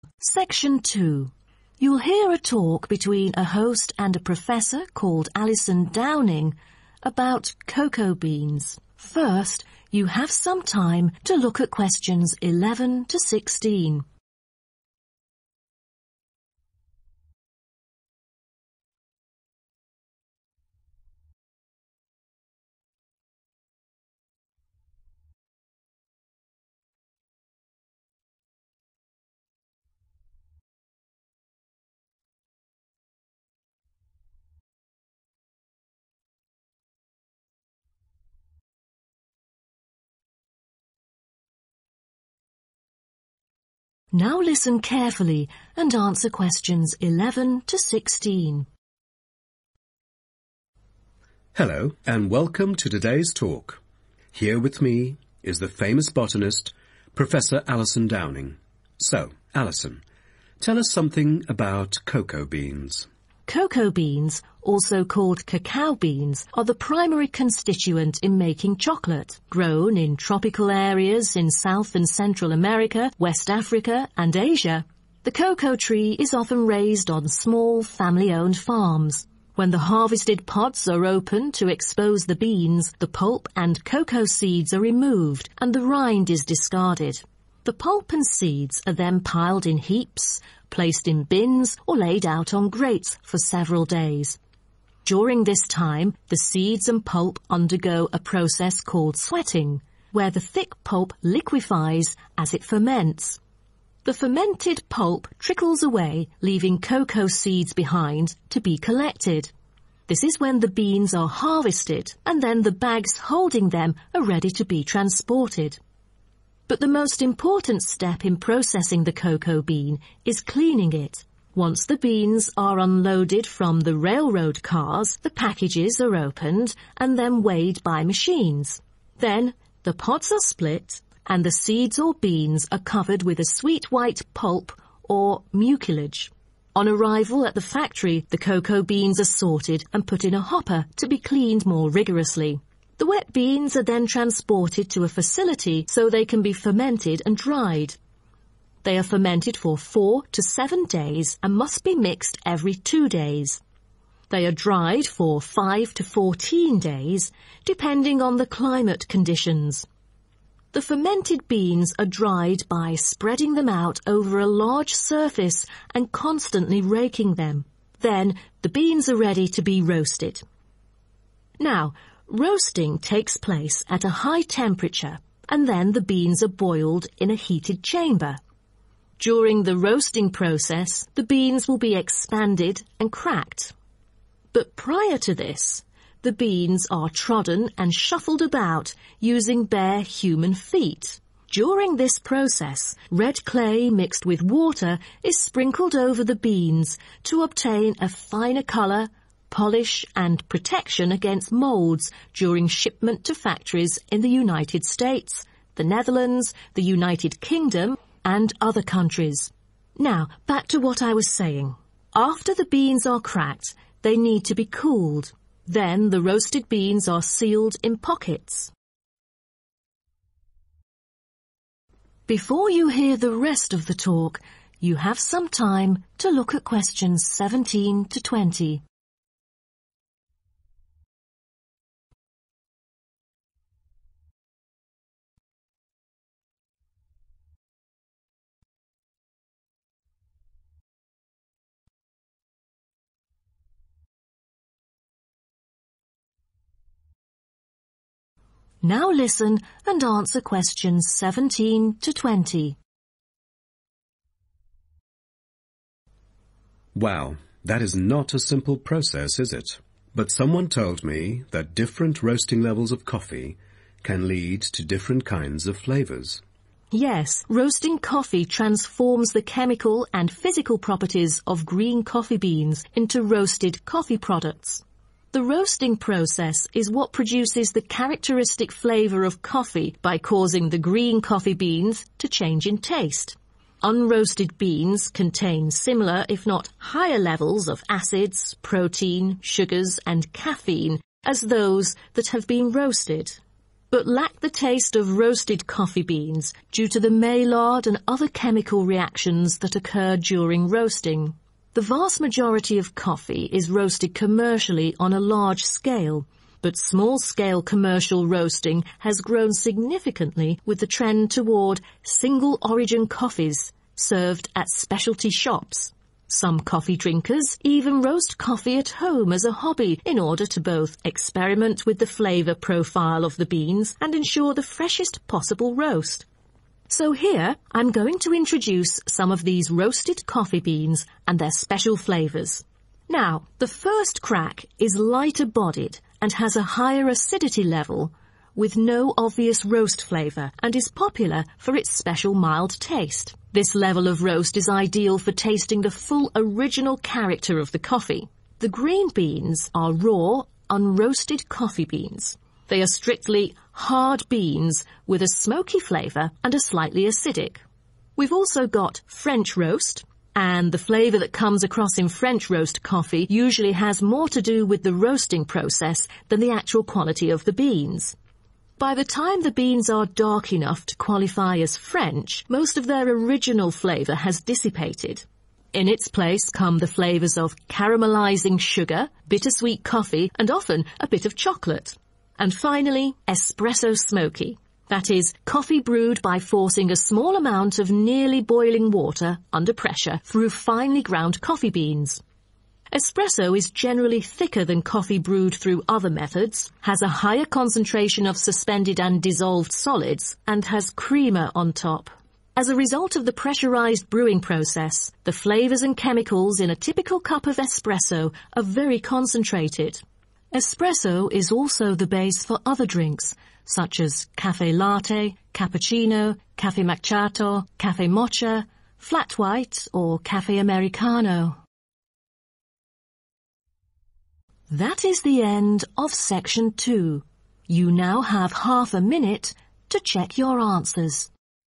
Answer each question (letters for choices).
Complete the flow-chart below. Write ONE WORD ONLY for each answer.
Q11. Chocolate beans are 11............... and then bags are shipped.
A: harvested

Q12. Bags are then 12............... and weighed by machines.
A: opened

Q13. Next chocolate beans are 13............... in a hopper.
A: cleaned

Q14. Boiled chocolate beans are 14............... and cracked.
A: expanded

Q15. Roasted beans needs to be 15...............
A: cooled

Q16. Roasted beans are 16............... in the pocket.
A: sealed

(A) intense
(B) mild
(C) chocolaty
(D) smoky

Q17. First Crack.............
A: B

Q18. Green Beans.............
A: D

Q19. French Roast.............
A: C

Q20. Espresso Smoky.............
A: A